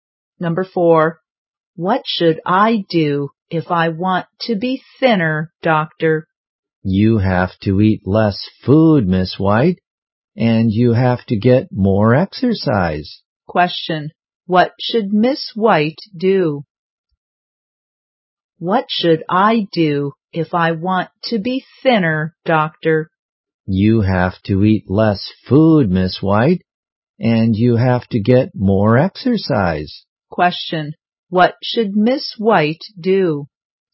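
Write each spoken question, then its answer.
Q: What should Miss White do?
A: Eat less food and get more exercise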